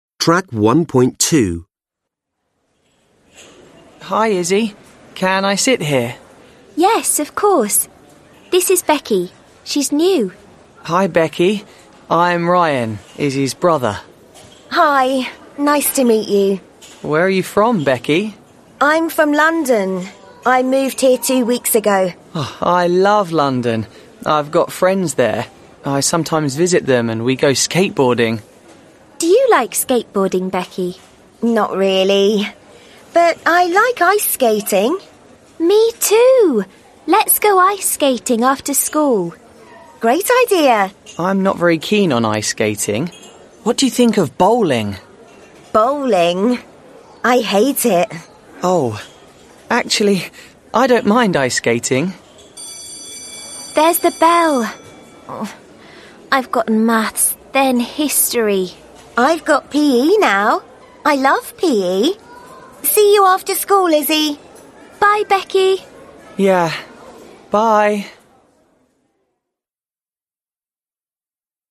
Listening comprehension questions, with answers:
Are the sentences true or false? Write T or F.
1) This is the first time Izzy and Ryan have met.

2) This is the first time Becky and Ryan have met.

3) Ryan sometimes goes skateboarding in London,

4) Becky does not like skateboarding or bowling.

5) Ryan and Becky agree to go ice skating after school.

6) Izzy and Becky have got PE next.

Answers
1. F
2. T
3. T
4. T
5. F
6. F

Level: Lớp 10